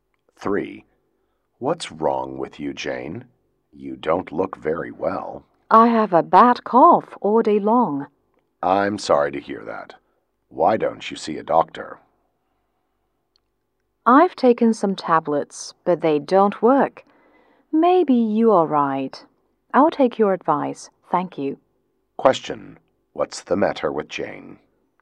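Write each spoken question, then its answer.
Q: What's the matter with Jane?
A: She has a bad cough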